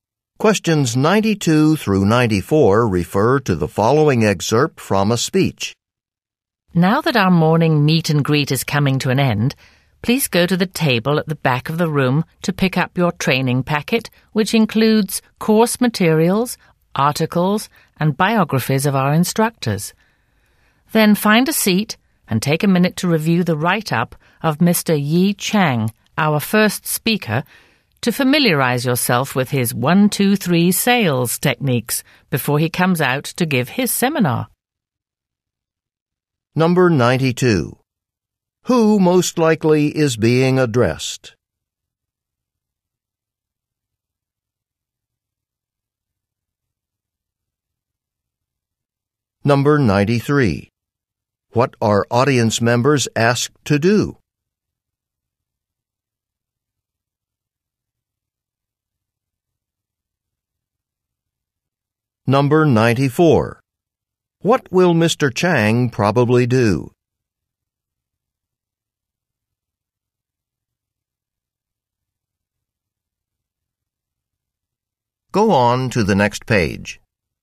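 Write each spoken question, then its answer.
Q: Who most likely is being addressed?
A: Sales trainees

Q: What are audience members asked to do?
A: Pick up a training packet

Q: What will Mr. Chang probably do?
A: Give a seminar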